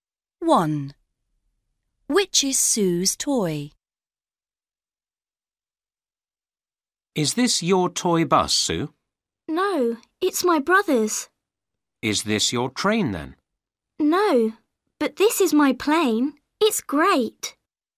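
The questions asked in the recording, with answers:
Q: Which is Sue's toy?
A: Her plane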